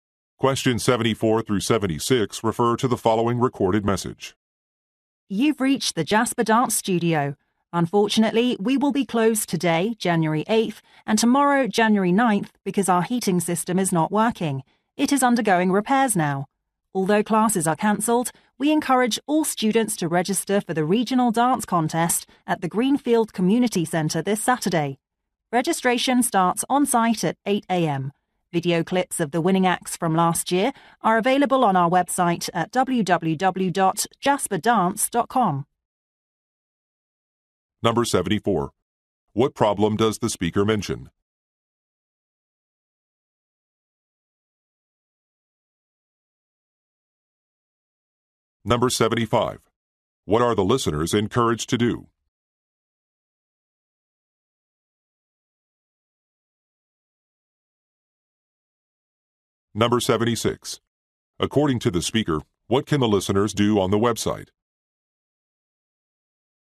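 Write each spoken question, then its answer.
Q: What problem does the speaker mention?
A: The heating system is not working

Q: What are the listeners encouraged to do?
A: Register for the regional dance contest

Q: According to the speaker, what can the listeners do on the website?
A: Watch video clips of last year's winning acts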